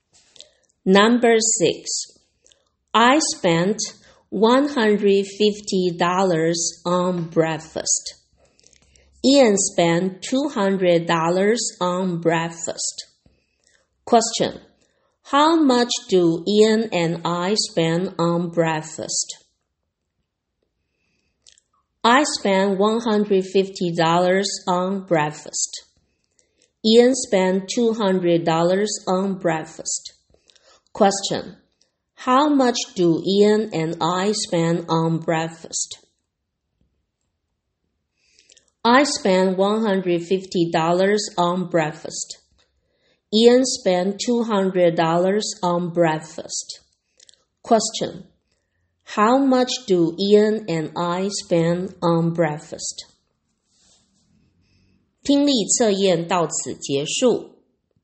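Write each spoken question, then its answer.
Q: How much do Ian and I spend on breakfast?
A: $350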